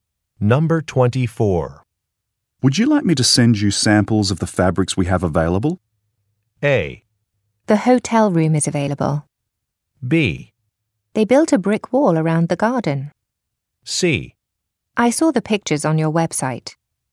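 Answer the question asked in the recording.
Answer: C: I saw the pictures on your website.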